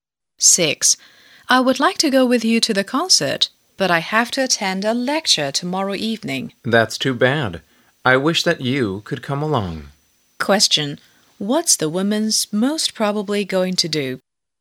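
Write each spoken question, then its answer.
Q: What's the woman's most probably going to do?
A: Go to the concert without the man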